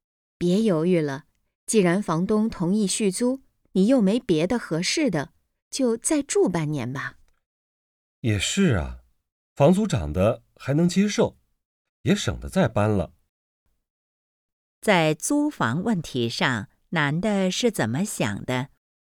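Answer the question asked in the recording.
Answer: 续租,再住半年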